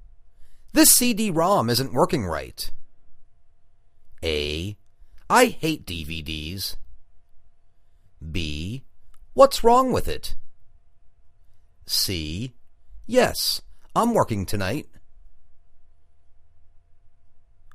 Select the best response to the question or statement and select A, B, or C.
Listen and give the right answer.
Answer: What's wrong with it?